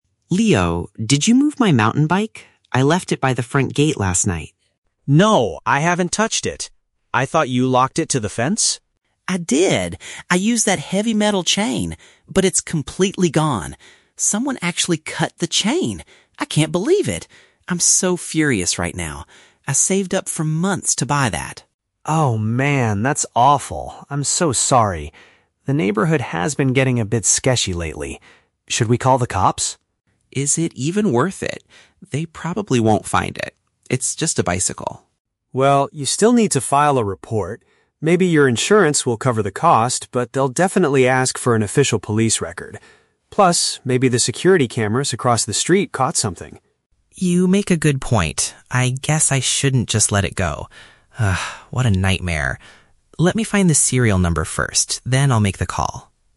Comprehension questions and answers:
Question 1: How does Mark feel about his missing bicycle?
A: He is extremely angry because it was expensive to buy.

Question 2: Why did Mark initially hesitate to contact the authorities?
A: He thought the police wouldn't be able to recover his bike.

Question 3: What is one reason Leo suggests reporting the crime?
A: To get the money back from the insurance company.

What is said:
Mark: Leo, did you move my mountain bike? I left it by the front gate last night.
Leo: No, I haven't touched it. I thought you locked it to the fence?
Mark: I did! I used that heavy metal chain. But it's completely gone. Someone actually cut the chain! I can't believe it. I'm so furious right now. I saved up for months to buy that.
Leo: Oh man, that's awful. I'm so sorry. The neighborhood has been getting a bit sketchy lately. Should we call the cops?
Mark: Is it even worth it? They probably won't find it. It's just a bicycle.
Leo: Well, you still need to file a report. Maybe your insurance will cover the cost, but they'll definitely ask for an official police record. Plus, maybe the security cameras across the street caught something.
Mark: You make a good point. I guess I shouldn't just let it go. Ugh, what a nightmare. Let me find the serial number first, then I'll make the call.